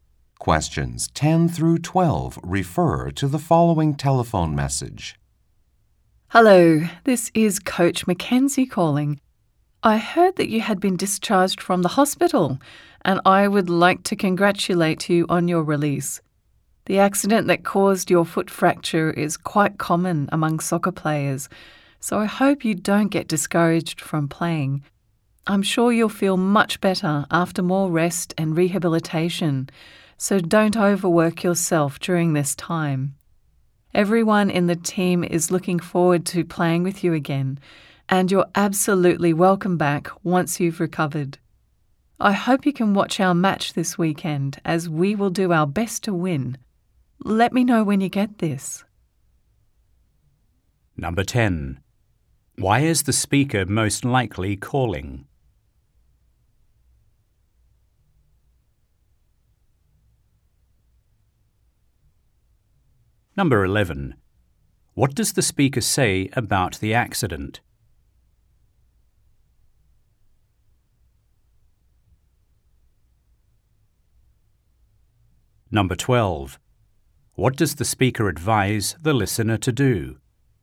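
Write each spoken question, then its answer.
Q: Why is the speaker most likely calling?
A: To congratulate the listener on being released from the hospital and wish them a good recovery

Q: What does the speaker say about the accident?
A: It is quite common among soccer players

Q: What does the speaker advise the listener to do?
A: Rest and not overwork themselves during rehabilitation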